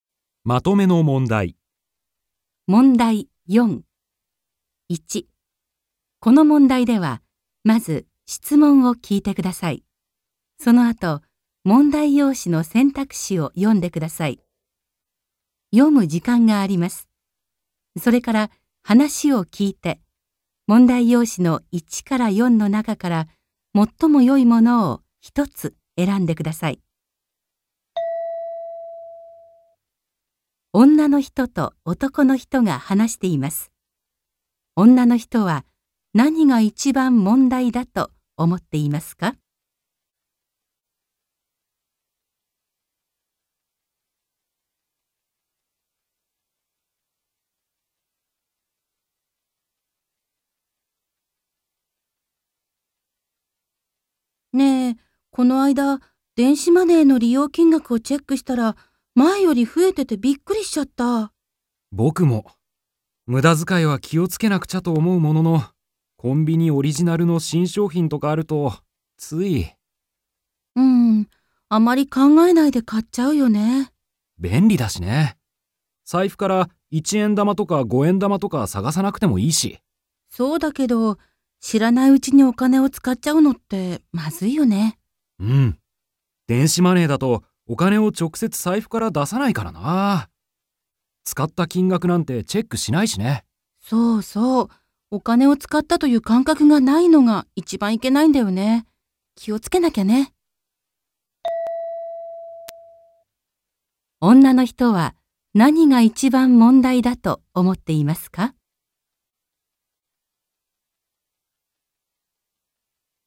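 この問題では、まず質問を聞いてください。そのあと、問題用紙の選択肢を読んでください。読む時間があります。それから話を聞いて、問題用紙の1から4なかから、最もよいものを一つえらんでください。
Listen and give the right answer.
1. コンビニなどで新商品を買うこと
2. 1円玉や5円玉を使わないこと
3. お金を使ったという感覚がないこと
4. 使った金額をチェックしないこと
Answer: 3. お金を使ったという感覚がないこと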